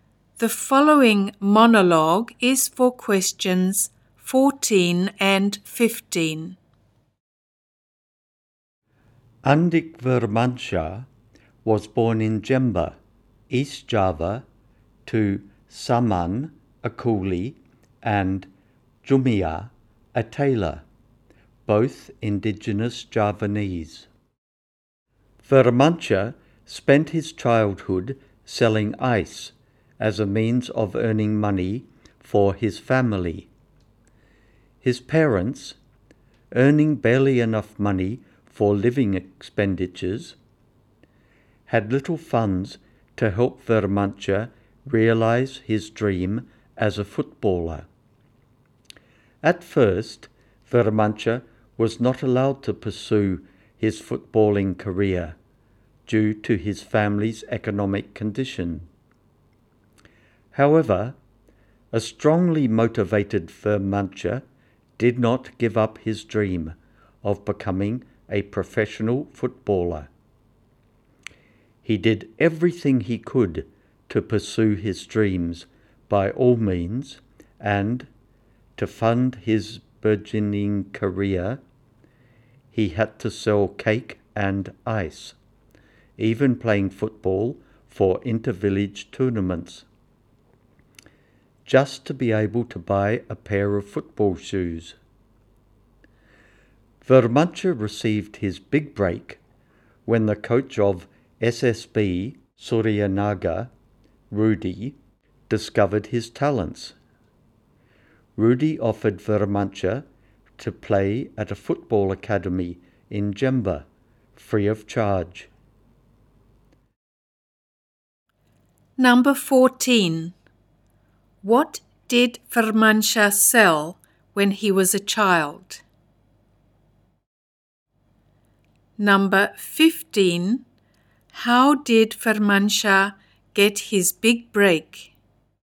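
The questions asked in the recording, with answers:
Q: What did Vermansyah sell when he was a child?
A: Ice (and cake)

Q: How did Vermansyah get his big break?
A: Coach Rudy of SSB Suryanaga discovered his talent and offered him a free place at a football academy in Jember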